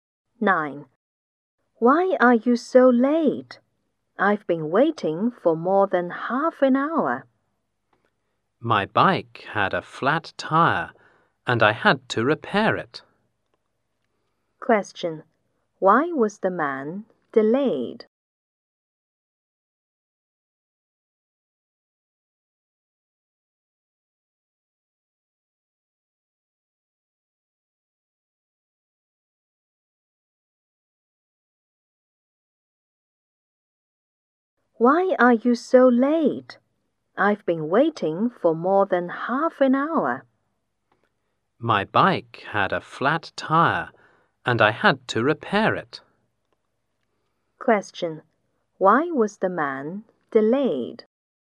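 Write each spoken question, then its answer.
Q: Question. Why was the man delayed?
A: His bike had a flat tire and he had to repair it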